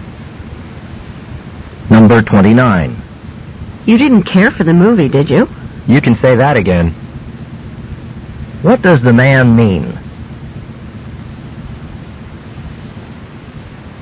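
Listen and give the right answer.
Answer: He didn't like the movie at all.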